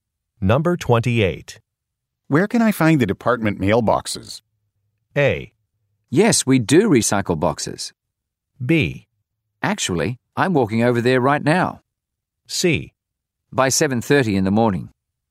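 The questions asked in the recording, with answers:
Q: Where can I find the department mailboxes?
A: B: Actually, I'm walking over there right now.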